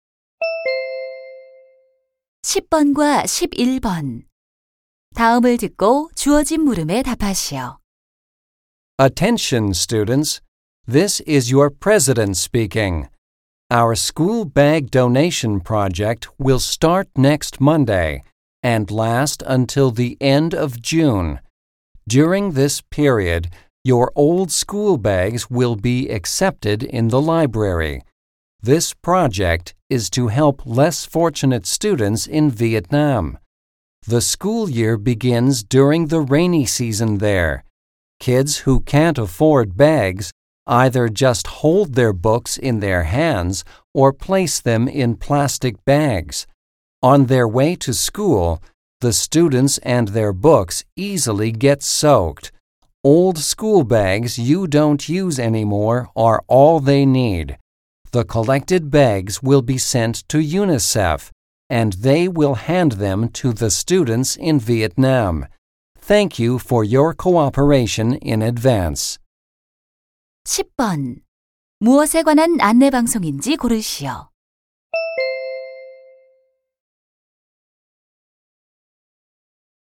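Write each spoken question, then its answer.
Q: 무엇에 관한 안내 방송인지 고르시오.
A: 베트남 학생들을 위한 헌 책가방 기부 행사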